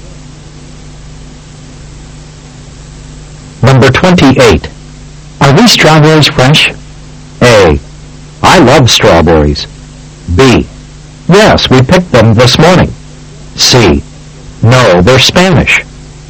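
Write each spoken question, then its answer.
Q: Are these strawberries fresh?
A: B: Yes, we picked them this morning.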